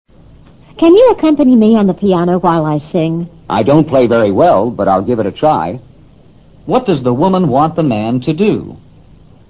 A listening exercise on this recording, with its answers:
What does the woman want the man to do?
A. Play the piano.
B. Learn to sing.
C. Keep her company.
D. Teach her to sing.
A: Play the piano.

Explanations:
从男子说 "I don't play very well"也可做出正确选择。accompany me on the piano: 用钢琴伴唱。give it a try: 试试。keep her company:陪伴她。

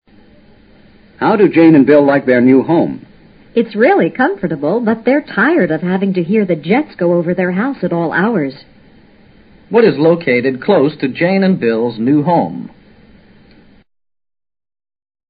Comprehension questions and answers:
What is located close to Jane and Bill's new home?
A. A bus station.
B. An airport.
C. A super highway.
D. A train station.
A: An airport.

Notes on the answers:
they're tired of having to hear the jets go over their house at all hours 提供了足够进行判断的信息。关键是明白jet(喷气飞机)的意思。 super highway: 超级高速公路。

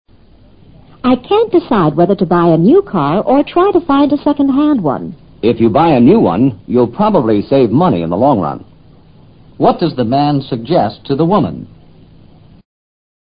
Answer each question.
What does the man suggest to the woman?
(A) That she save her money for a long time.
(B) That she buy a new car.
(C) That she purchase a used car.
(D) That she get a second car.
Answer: That she buy a new car.

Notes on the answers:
If you buy a new one, you'll probably save money in the long run这句话的意思是"从长远观点来看,买辆新车可能还省钱。"答案与这句话的意思是相符的。second - hand car:归车,与used car同义。

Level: 世博高级听说

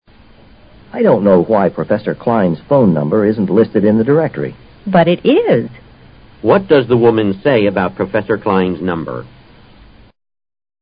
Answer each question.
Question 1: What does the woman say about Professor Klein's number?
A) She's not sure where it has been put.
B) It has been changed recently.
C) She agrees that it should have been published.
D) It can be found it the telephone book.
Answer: It can be found it the telephone book.

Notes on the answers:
But it is = it is listed in the directory (电话号码薄)。既然列在电话薄上,当然可以找到。telephone book = directory。

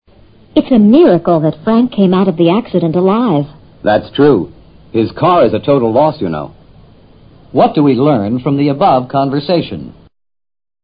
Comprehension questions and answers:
What do we learn from the above conversation?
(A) Frank's car was accidentally lost.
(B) Frank was killed in a car accident.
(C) Frank fell out of a car.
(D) Frank survived a car accident.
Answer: Frank survived a car accident.

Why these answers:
Frank came out of the accident alive 与Frank survived a car accident 基本意思相同。miracle: 奇迹。a total loss: 完全毁坏了。survive :作"幸免于死"解,是及物动词。

